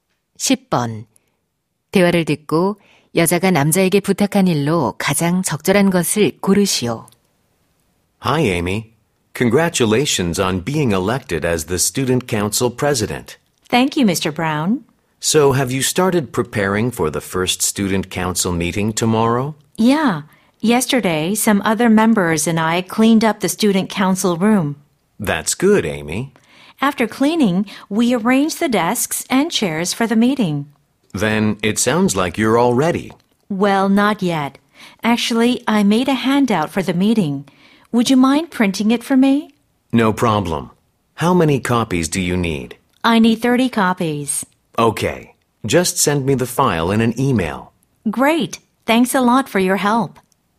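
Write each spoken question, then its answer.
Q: 대화를 듣고 여자가 남자에게 부탁한 일로 가장 적절한 것을 고르시오.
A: 회의 유인물 30부 인쇄하기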